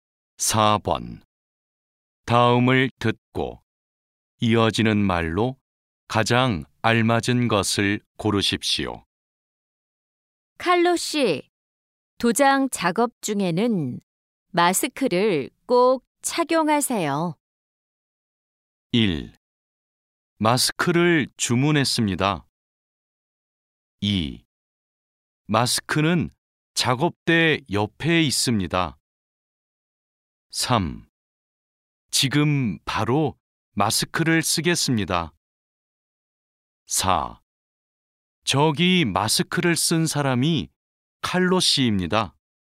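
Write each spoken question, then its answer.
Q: 다음을 듣고 이어지는 말로 가장 알맞은 것을 고르십시오.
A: 3: 지금 바로 마스크를 쓰겠습니다.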